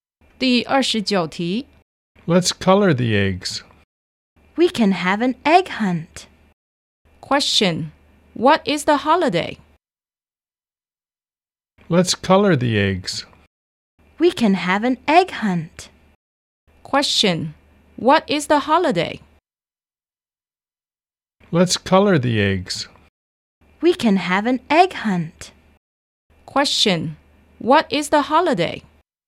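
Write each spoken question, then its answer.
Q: Question. What is the holiday?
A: Easter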